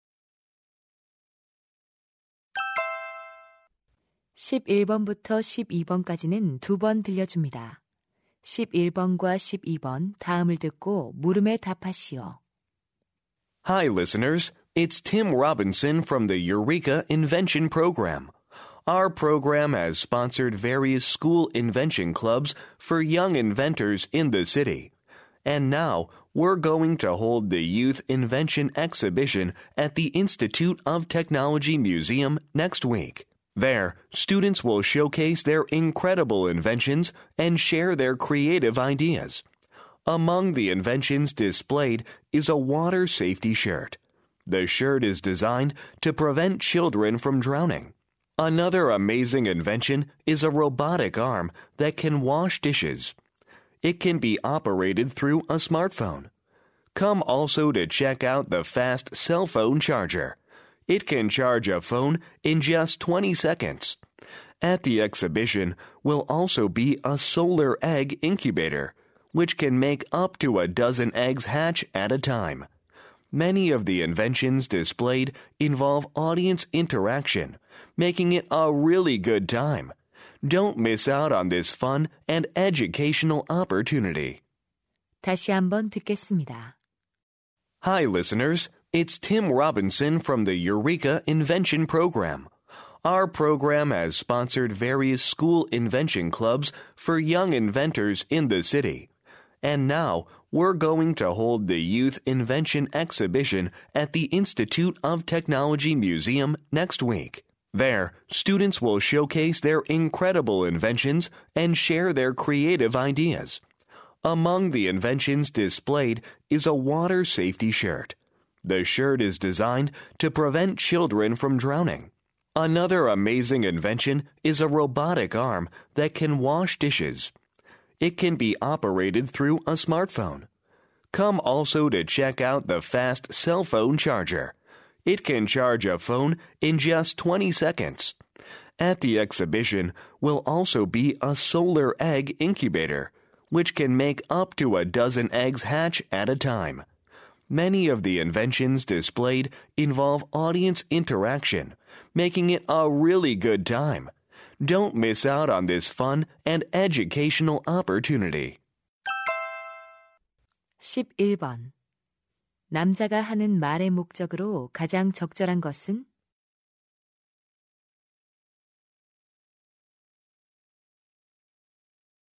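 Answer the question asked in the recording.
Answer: 청소년 발명품 전시회를 홍보하려고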